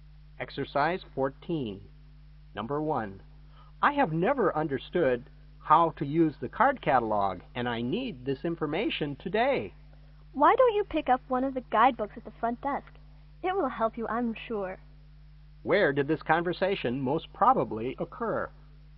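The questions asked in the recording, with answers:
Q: Where did this conversation most probably occur?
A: In a library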